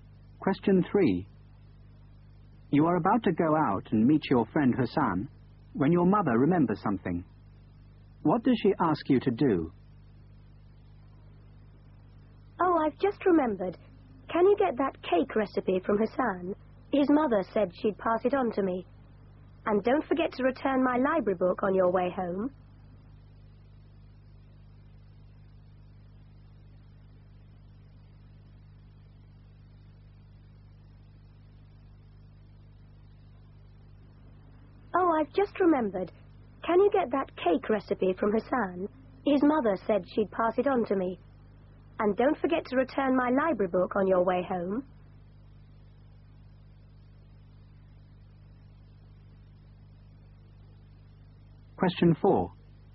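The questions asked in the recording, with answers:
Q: What does she ask you to do?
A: Get the cake recipe from Hassan and return her library book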